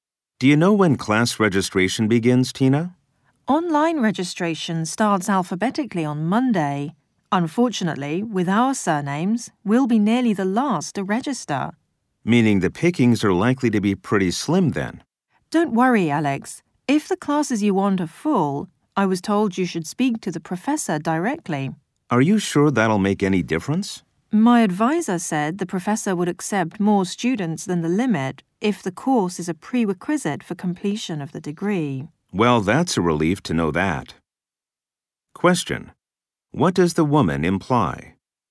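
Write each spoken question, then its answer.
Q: What does the woman imply?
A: If a class Alex needs is full, he can ask the professor, who may let more students in when the course is a prerequisite for the degree.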